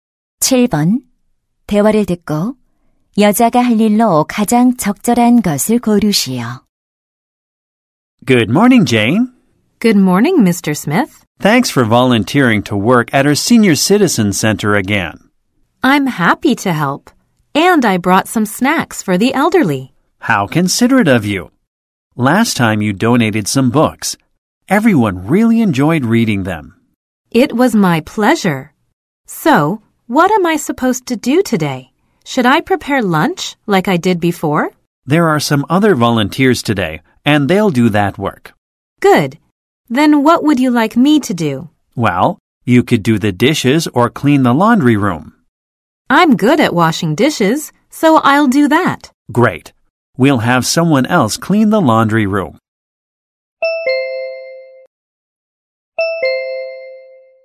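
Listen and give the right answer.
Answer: 설거지하기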